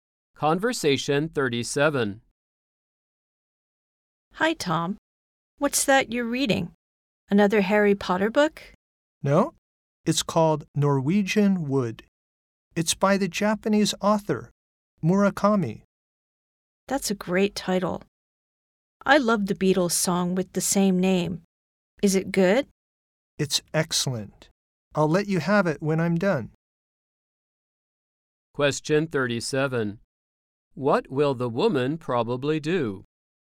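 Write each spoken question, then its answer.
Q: What will the woman probably do?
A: Read the book Norwegian Wood after Tom finishes it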